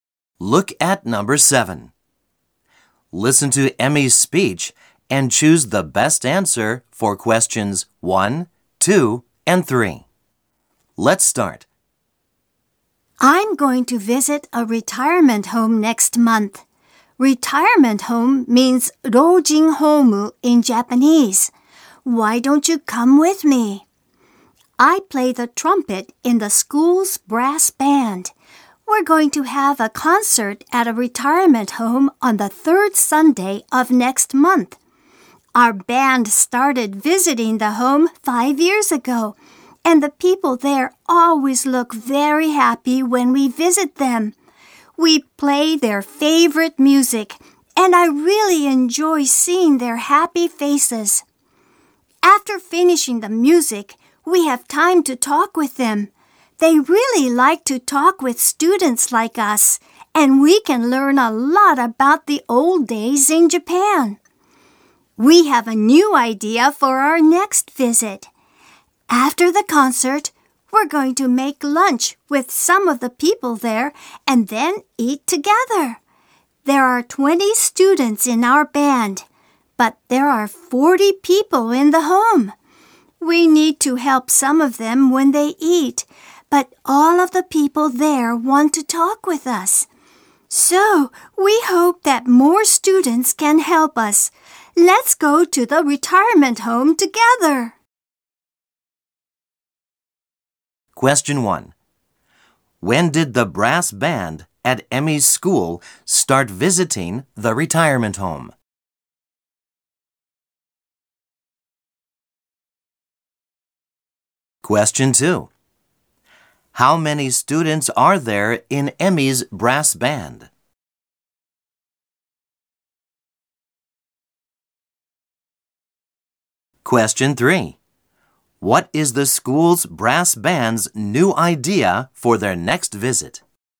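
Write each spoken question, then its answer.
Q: When did the brass band at Emmy's school start visiting the retirement home?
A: 5 years ago

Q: How many students are there in Emmy's brass band?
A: 20

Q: What is the school's brass band's new idea for their next visit?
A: To make lunch with some of the people there and eat together after the concert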